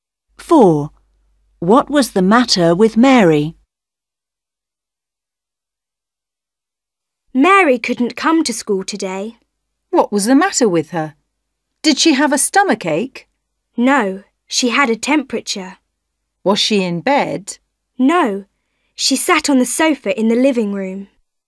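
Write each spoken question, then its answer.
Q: What was the matter with Mary?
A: she had a temperature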